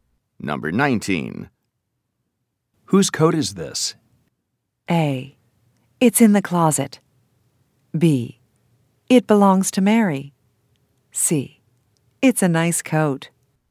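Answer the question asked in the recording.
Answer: B: It belongs to Mary.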